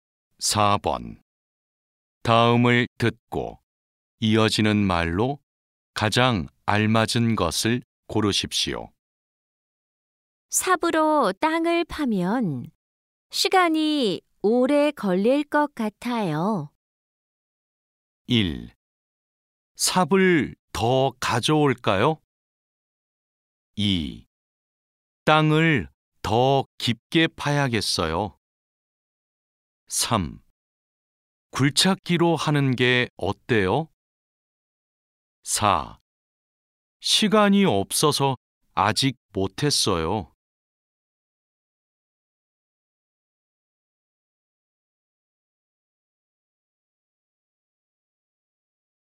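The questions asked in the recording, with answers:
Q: 다음을 듣고 이어지는 말로 가장 알맞은 것을 고르십시오.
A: 3: 굴착기로 하는 게 어때요?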